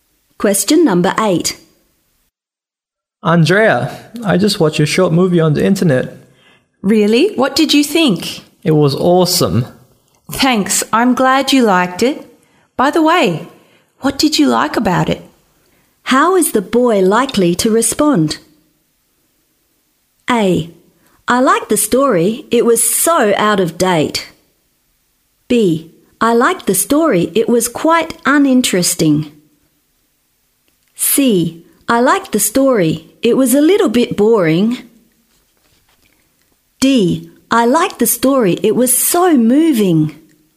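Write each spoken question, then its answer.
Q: How is the boy likely to respond?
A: D: I like the story, it was so moving.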